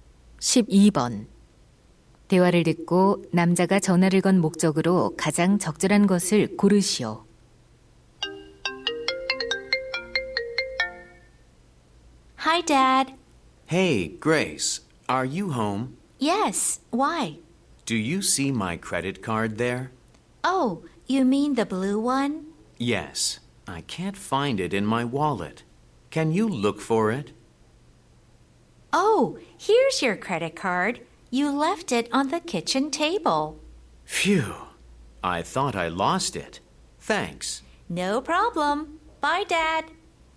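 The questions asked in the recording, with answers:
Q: 대화를 듣고 남자가 전화를 건 목적으로 가장 적절한 것을 고르시오.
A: 신용카드를 찾아 달라고 부탁하려고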